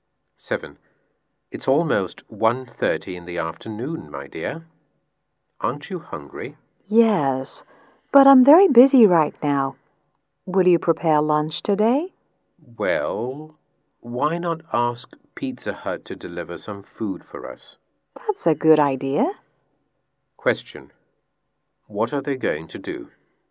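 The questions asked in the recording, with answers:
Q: What are they going to do?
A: Ask Pizza Hut to deliver some food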